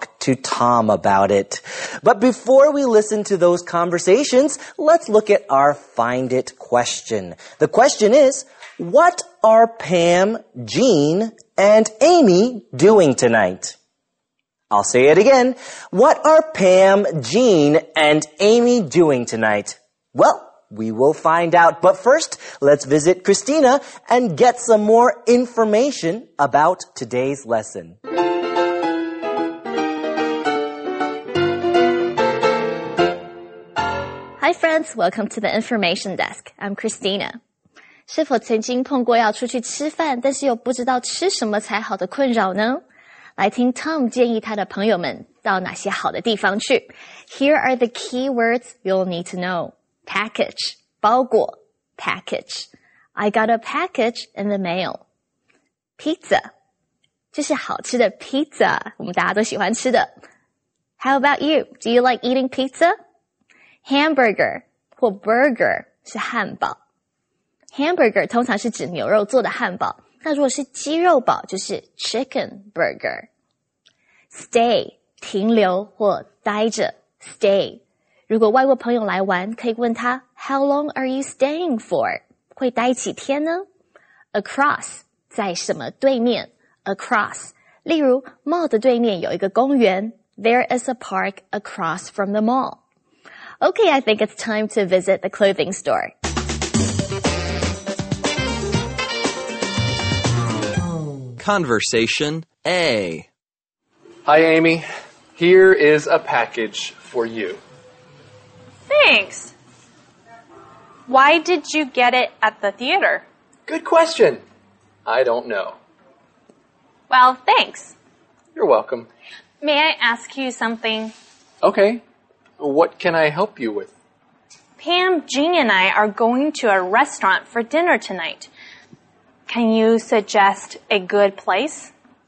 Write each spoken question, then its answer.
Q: What are Pam, Jean, and Amy doing tonight?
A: They are going to a restaurant for dinner.